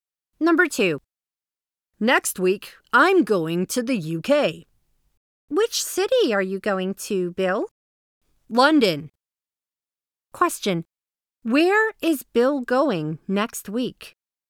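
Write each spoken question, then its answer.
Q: Where is Bill going next week?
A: London, the UK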